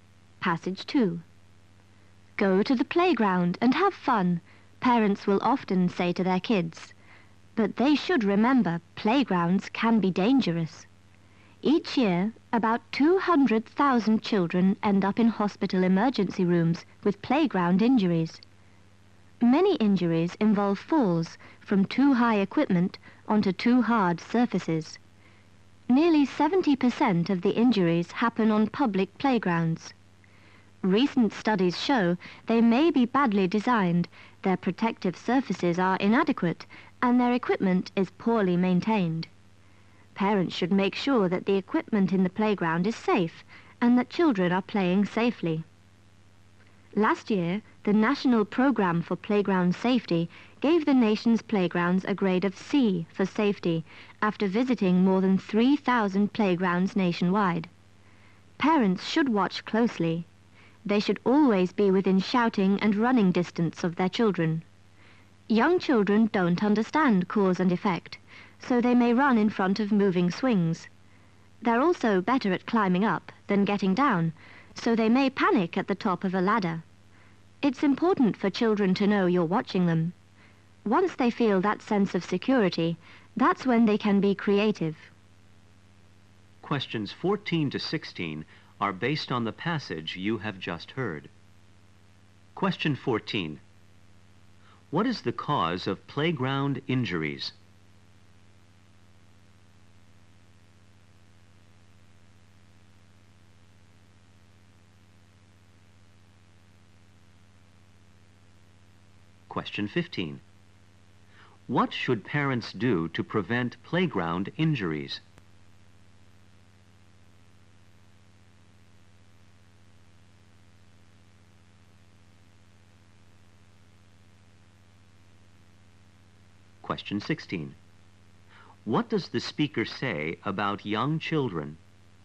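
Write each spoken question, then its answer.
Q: What is the cause of playground injuries?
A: Falls from equipment that is too high onto surfaces that are too hard

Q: What should parents do to prevent playground injuries?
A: Watch their children closely and stay within shouting and running distance

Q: What does the speaker say about young children?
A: They don't understand cause and effect.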